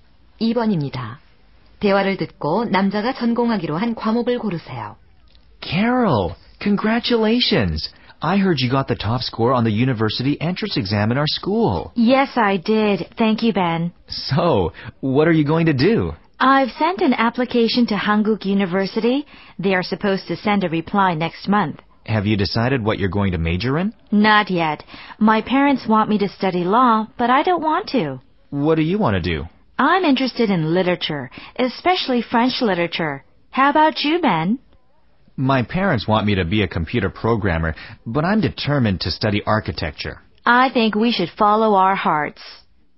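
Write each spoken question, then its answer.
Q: 대화를 듣고 남자가 전공하기로 한 과목을 고르세요.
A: 건축학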